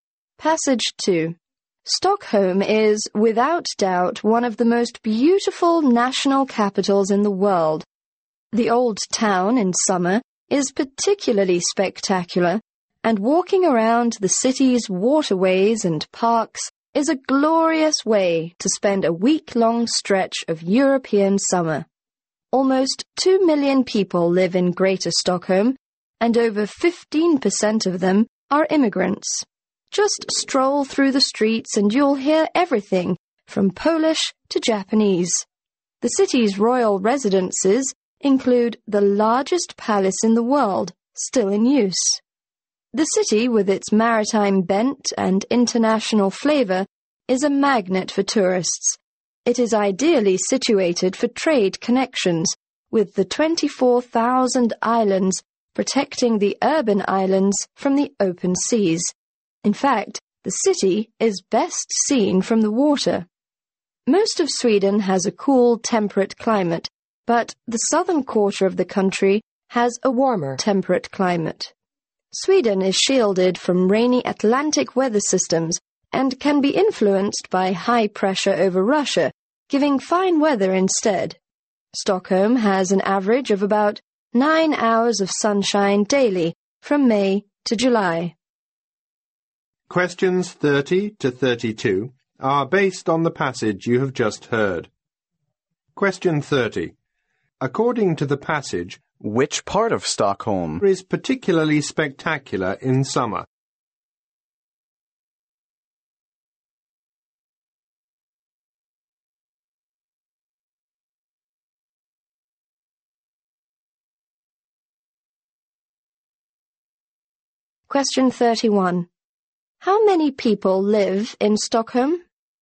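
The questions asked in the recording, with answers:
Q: which part of Stockholm is particularly spectacular in summer?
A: The old town

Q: How many people live in Stockholm?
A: Almost 2 million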